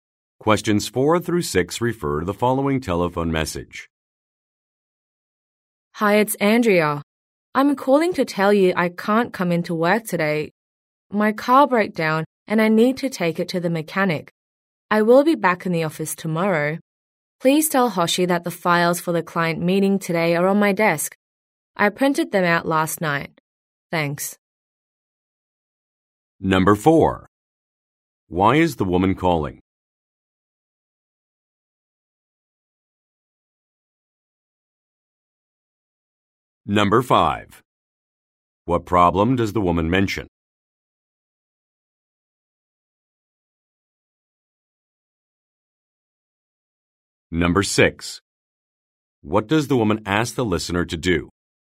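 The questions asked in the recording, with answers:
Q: Why is the woman calling?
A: To say she can't come to work today

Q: What problem does the woman mention?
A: Her car broke down

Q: What does the woman ask the listener to do?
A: Tell Hoshi the files for the client meeting are on her desk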